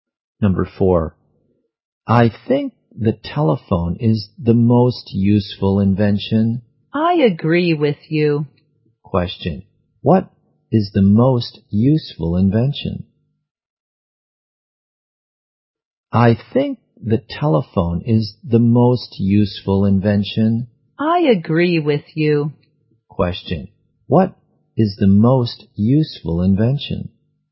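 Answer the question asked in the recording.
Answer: The telephone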